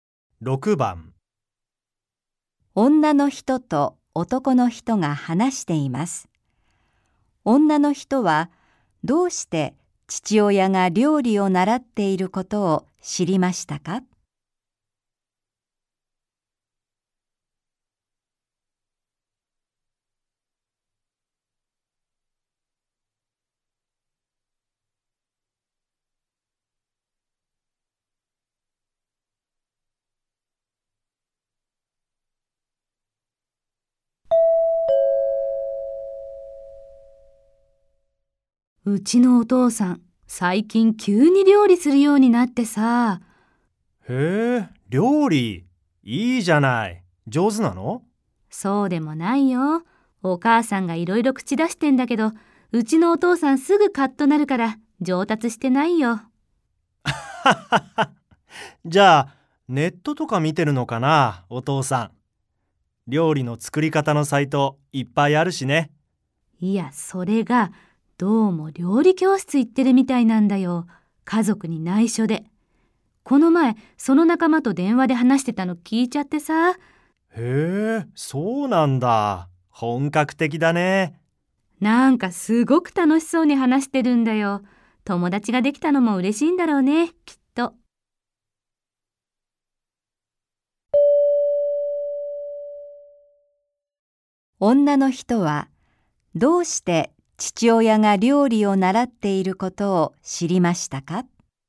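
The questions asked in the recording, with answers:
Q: 女の人はどうして父親が料理を習っていることを知りましたか?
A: 父親が料理教室の仲間と電話で話しているのを聞いたから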